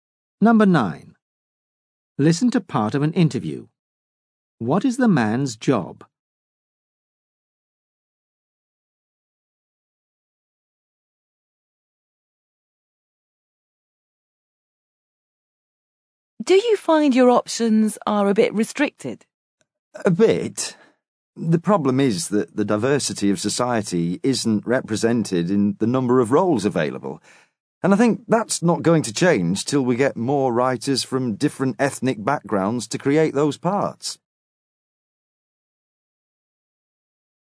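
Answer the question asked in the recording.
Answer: An actor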